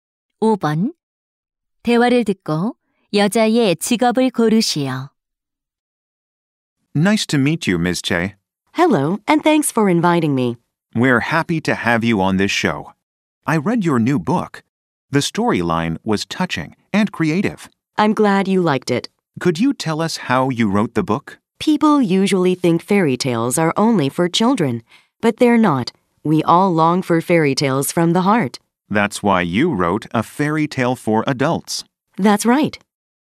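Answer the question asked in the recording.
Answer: 동화 작가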